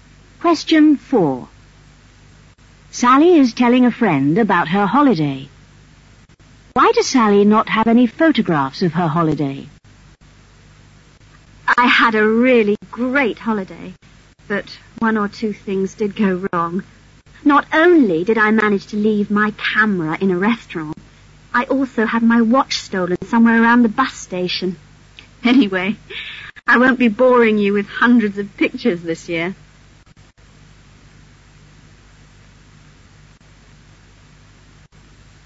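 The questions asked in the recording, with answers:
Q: Why does Sally not have any photographs of her holiday?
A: She left her camera in a restaurant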